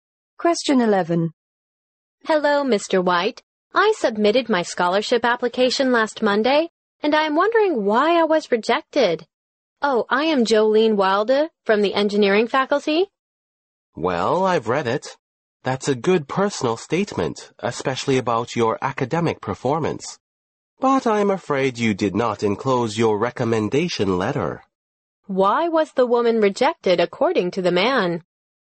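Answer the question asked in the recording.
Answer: She did not enclose her recommendation letter.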